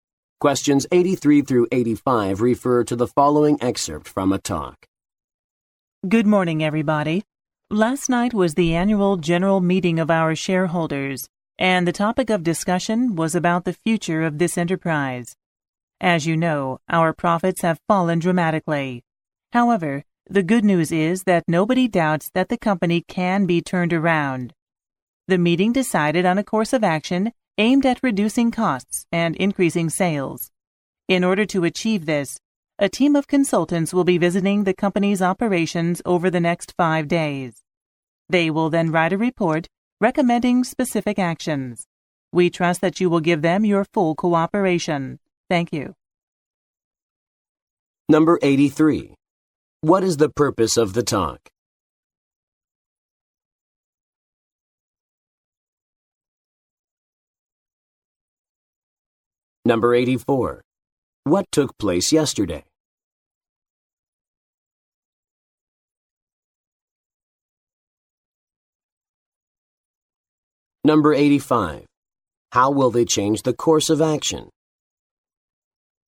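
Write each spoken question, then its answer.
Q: What is the purpose of the talk?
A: To report on the shareholders' meeting about the company's future

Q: What took place yesterday?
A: The annual general meeting of shareholders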